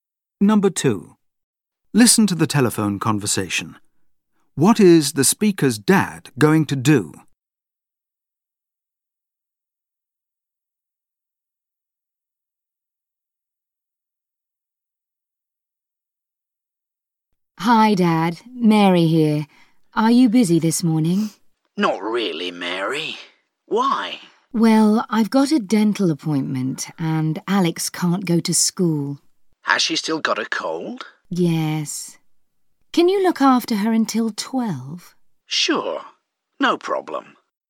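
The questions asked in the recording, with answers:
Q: What is the speaker's dad going to do?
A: Look after Alex, his granddaughter, until 12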